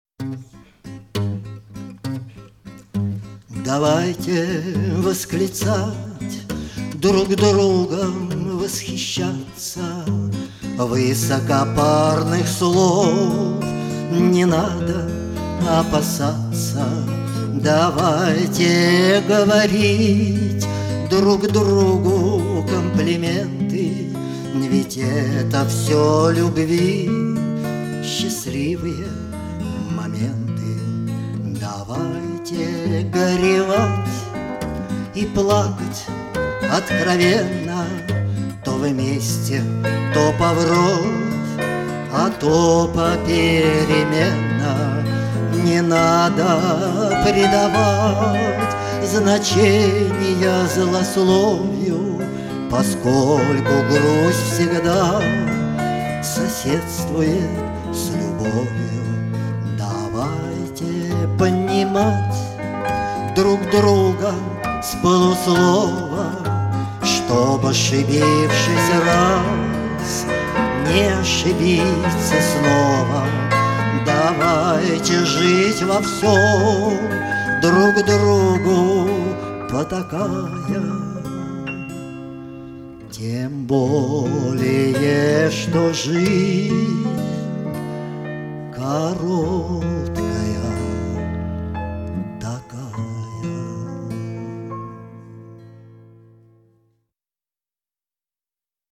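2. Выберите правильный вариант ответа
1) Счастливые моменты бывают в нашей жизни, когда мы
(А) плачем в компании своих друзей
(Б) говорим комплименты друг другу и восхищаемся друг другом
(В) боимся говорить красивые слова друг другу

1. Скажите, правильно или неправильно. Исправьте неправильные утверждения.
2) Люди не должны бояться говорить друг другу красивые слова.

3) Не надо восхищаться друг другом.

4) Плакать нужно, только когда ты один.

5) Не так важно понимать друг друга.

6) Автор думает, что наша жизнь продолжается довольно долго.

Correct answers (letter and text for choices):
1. (Б) говорим комплименты друг другу и восхищаемся друг другом
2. правильно
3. неправильно: давайте друг другом восхищаться
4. неправильно: то вместе, то поврозь, а то попеременно
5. неправильно: давайте понимать друг друга с полуслова
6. неправильно: жизнь короткая

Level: А2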